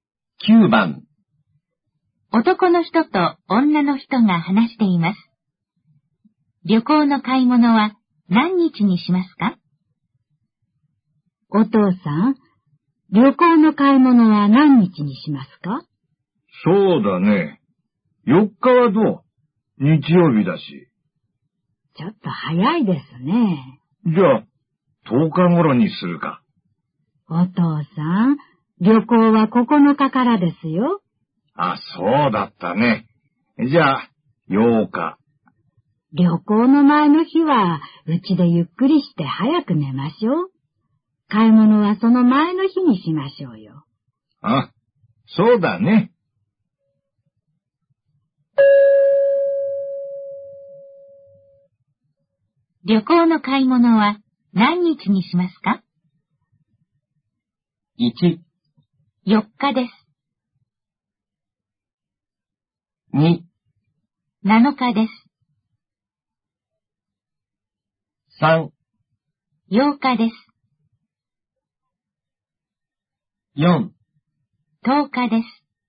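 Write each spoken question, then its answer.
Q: 旅行の買い物は何日にしますか?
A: 2: 7日です。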